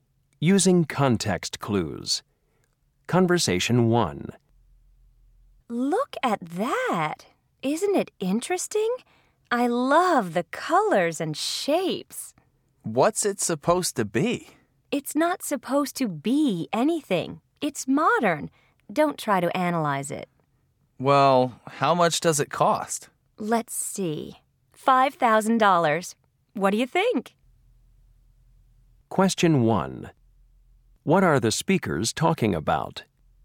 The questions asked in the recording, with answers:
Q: What are the speakers talking about?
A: $5,000 for that painting?